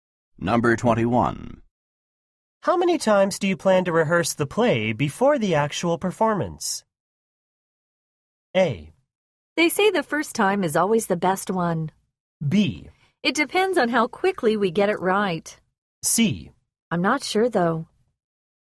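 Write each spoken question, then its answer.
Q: How many times do you plan to rehearse the play before the actual performance?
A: B: It depends on how quickly we get it right.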